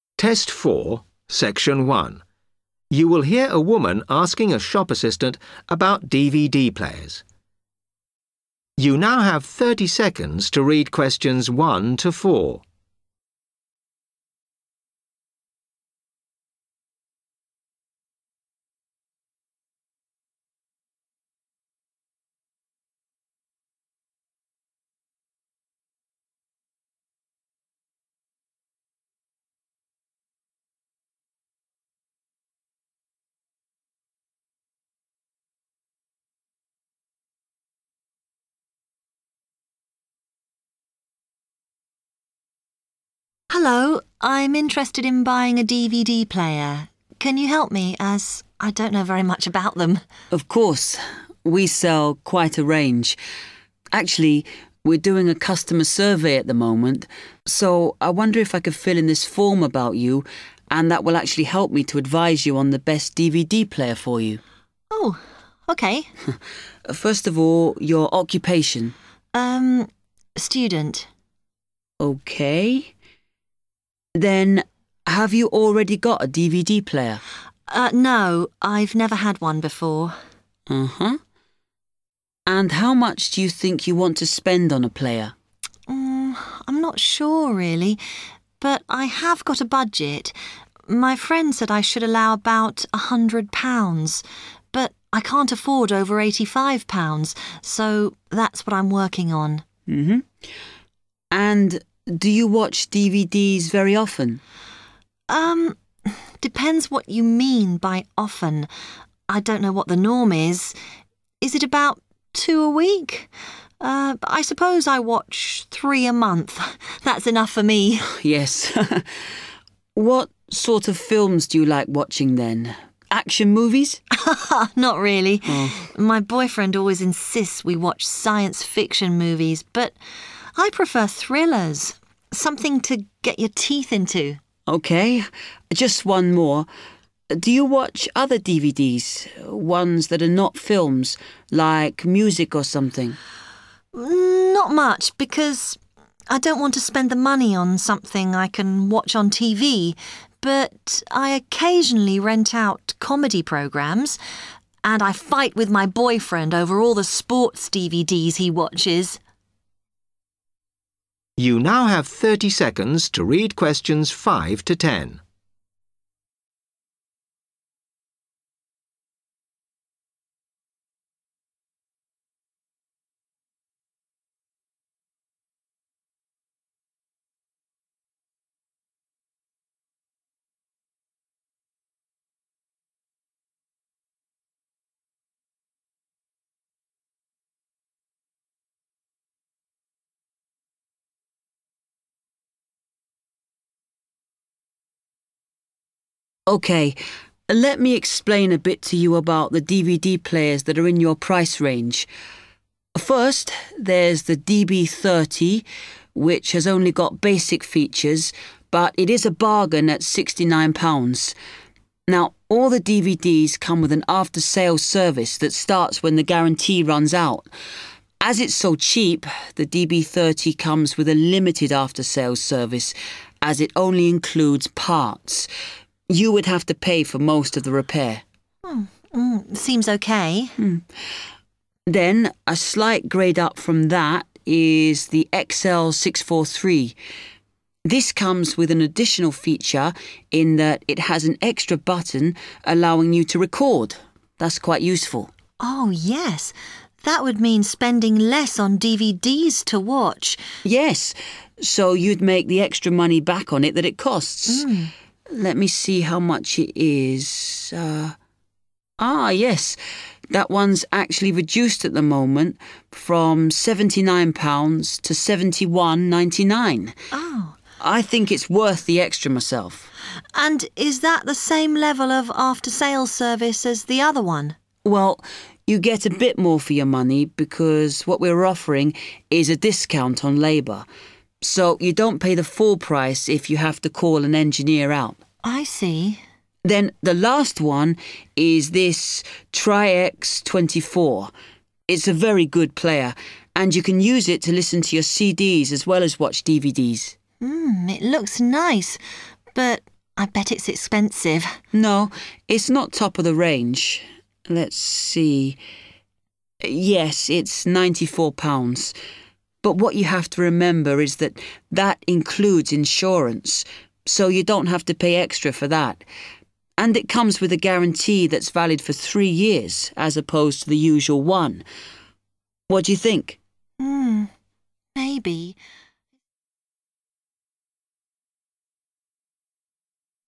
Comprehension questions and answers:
Complete the form below. Write NO MORE THAN THREE WORDS AND/OR A NUMBER for each answer.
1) What is the maximum you want to spend on a DVD player?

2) How often do you watch DVDs?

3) What type of films do you enjoy?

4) What other DVDs (non-film) do you watch?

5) only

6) Can also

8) at reduced cost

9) Will also play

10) £94 including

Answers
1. £85 / 85 pounds
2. 3 a month / three a month
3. thrillers
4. comedy programmes / comedy / comedy programs
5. parts
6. record
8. labour / labor
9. CDs
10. insurance

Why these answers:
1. The transcript shows the customer saying that £85 is the highest price she can pay for a DVD player. Answer Explanation: The answer means the highest amount of money the customer can spend is 85 pounds. Reason For Correctness: The correct answer is £85 because the customer explicitly states her maximum spending limit. Although her friend suggested £100, the customer mentions that she cannot afford anything over £85.
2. The transcript shows the customer confirming that she watches three DVDs per month. Answer Explanation: The answer means that the customer watches three DVDs every month. Reason For Correctness: The correct answer is "3 a month" (or "three a month") because when the shop assistant asks how often she watches DVDs, the customer states her actual viewing habit: "I suppose I watch three a month." Although she mentions "two a week", that is just a question about what is standard, not her own habit.
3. The transcript shows the customer explaining that she likes and prefers to watch thriller movies instead of science-fiction or action films. Answer Explanation: The answer "thrillers" refers to an exciting genre of movies that involves mystery, suspense, and tension. Reason For Correctness: The correct answer is "thrillers" because the shop assistant asks the customer what sort of films she likes watching. While she mentions that her boyfriend insists on science-fiction movies, she specifically states that she herself prefers "thrillers".
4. The transcript shows the shop assistant asking what other types of DVDs that are not films the customer watches, and the customer answers that she sometimes rents comedy programmes. Answer Explanation: The answer refers to funny TV shows or funny video content, specifically "comedy" or "comedy programmes". Reason For Correctness: The correct answer is comedy (programmes) because the shop assistant asks the customer if she watches non-film DVDs (DVDs that are not movies). The customer replies that she sometimes rents out "comedy programmes".
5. The transcript explains that the post-purchase service for the DB 30 DVD player covers only the replacement components (parts), requiring the customer to pay for repair labor. Answer Explanation: The answer "parts" means the individual pieces or hardware components needed to fix a broken machine. Reason For Correctness: The correct answer is "parts" because the shop assistant explains the after-sales service for the DB 30 model. She mentions that because the model is inexpensive, its after-sales service is limited and "only includes parts", which directly matches the table prompt " only".
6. The transcript shows that the XL 643 DVD player includes an extra function that lets the user record content. Answer Explanation: The answer "record" means to capture and save video or audio programs so you can watch them again later. Reason For Correctness: The correct answer is "record" because when describing the features of the XL 643 model, the shop assistant explains that it has an extra feature and button that allows the user to record.
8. The transcript states that for this DVD player, customers receive a lower price (a discount) for the repair work done by an engineer. Answer Explanation: The answer "labour" means the physical work done by a person (such as a technician or engineer fixing a machine). Reason For Correctness: The correct answer is "labour" because the customer asks about the after-sales service for the XL 643 model. The shop assistant explains that the service package provides a "discount on labour", which matches the phrase "at reduced cost" in the table.
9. The transcript shows the shop assistant explaining that the TriX 24 player can play music CDs in addition to standard DVDs. Answer Explanation: The answer "CDs" refers to compact audio discs that people use to play and listen to music. Reason For Correctness: The correct answer is "CDs" because when the shop assistant describes the features of the "TriX 24" model, he explicitly states that you can use the device to "listen to your CDs" in addition to playing movies on DVD.
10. The transcript explains that the TriX 24 model costs £94, and this total price already includes insurance coverage. Answer Explanation: The answer is "insurance", which refers to financial protection that covers the cost of damage or problems. Reason For Correctness: The correct answer is "insurance" because the shop assistant mentions that the TriX 24 costs £94 and specifically points out that this price "includes insurance". Therefore, the missing word in the table for the cost of the TriX 24 player is "insurance".

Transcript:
Customer: Hello. I'm interested in buying a DVD player. Can you help me as I don't know very much about them.
Shop assistant: Of course. We sell quite a range. Actually, we're doing a customer survey at the moment. So I wonder if I could fill in this form about you and that will actually help me to advise you on the best DVD player for you.
Customer: OK ...
Shop assistant: First of all, your occupation?
Customer: Um - student.
Shop assistant: OK. Then, have you already got a DVD player?
Customer: No. I've never had one before.
Shop assistant: And how much do you think you want to spend on a player?
Customer: I'm not sure really - but I have got a budget. My friend said I should allow about £100 but I can't afford over £85, so that's what I'm working on.
Shop assistant: And do you watch DVDs very often?
Customer: Um - depends what you mean by often. I don't know what the norm is - is it about two a week?
I suppose I watch three a month. That's enough for me!
What sort of films do you like watching then? Action movies?
Customer: (laughs) Not really. My boyfriend always insists we watch science-fiction movies but I prefer thrillers. Something to get your teeth into!
Shop assistant: OK. Just one more. Do you watch other DVDs - ones that are not films - like music or something?
Customer: Not much because I don't want to spend the money on something I can watch on TV but I occasionally rent out comedy programmes. And I fight with my boyfriend over all the sports DVDs he watches.
Shop assistant: OK. Let me explain a bit to you about the DVD players that are in your price range. First there's the DB 30 which has only got basic features but it is a bargain at £69. Now all the DVDs come with an after-sales service that starts when the guarantee runs out. As it's so cheap the DB30 comes with a limited after-sales service as it only includes parts. You would have to pay for most of the repair.
Customer: Seems OK.
Shop assistant: Then a slight grade up from that is the XL 643. This comes with an additional feature in that it has an extra button allowing you to record. That's quite useful.
Customer: Oh yes. That would mean spending less on DVDs to watch.
Shop assistant: Yes, so you'd make the extra money back on it that it costs. Let me see how much it is ... ah, yes, that one's actually reduced at the moment - from £79 to £71.99. I think it's worth the extra myself.
Customer: And is that the same level of after-sales service as the other one?
Shop assistant: Well, you get a bit more for your money because what we are offering is a discount on labour. So you don't pay the full price if you have to call an engineer out.
Customer: I see.
Shop assistant: Then the last one is this TriX 24. It's a very good player and you can use it to listen to your CDs as well as watch DVDs.
Customer: It looks nice - but I bet it's expensive.
Shop assistant: No, it's not top of the range. Let's see - yes it's £94 - but, what you have to remember is that, that includes insurance, so you don't have to pay extra for that. And it comes with a guarantee that's valid for three years as opposed to the usual one.